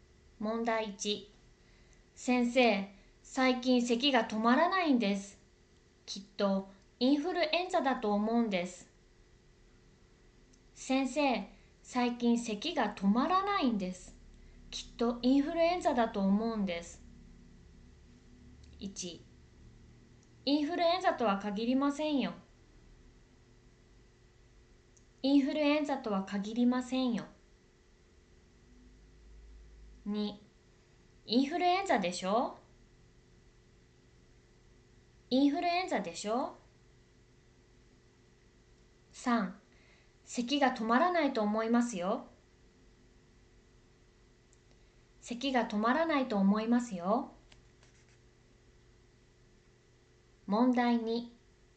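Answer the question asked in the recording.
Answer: 1: インフルエンザとは限りませんよ。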